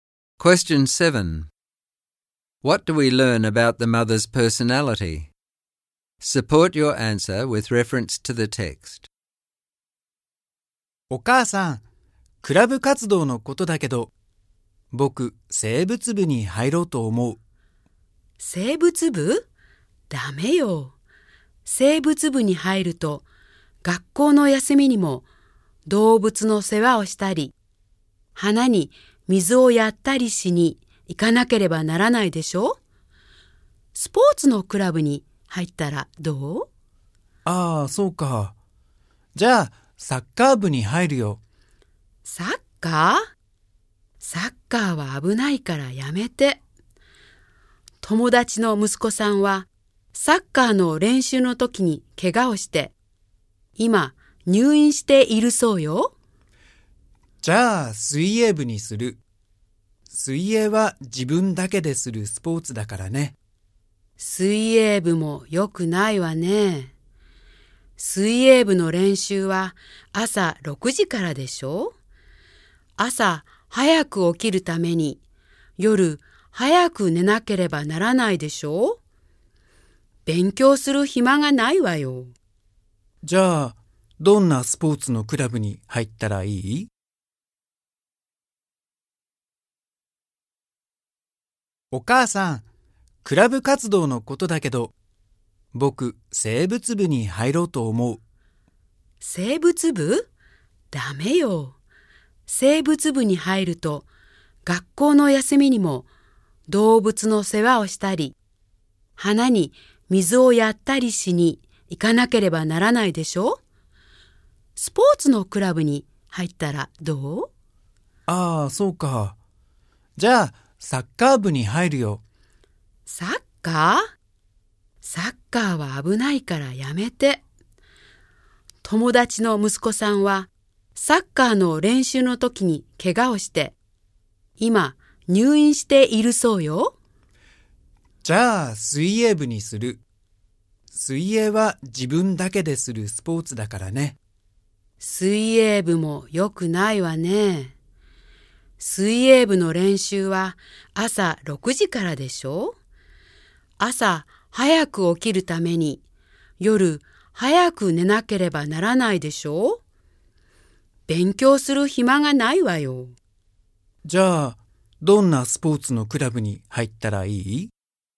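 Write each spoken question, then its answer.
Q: What do we learn about the mother's personality?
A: She is overprotective and controlling: she rejects every club her son suggests (biology club because of the holiday duties, soccer because it is dangerous, swimming because it leaves no time to study)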